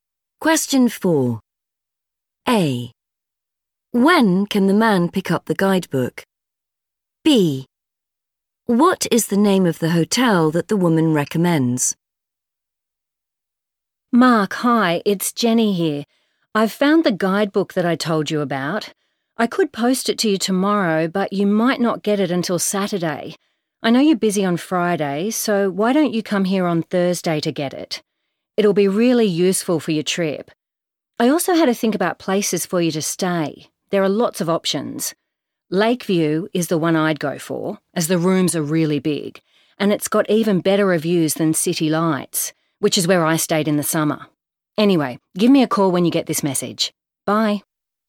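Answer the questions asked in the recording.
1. Thursday
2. Lakeview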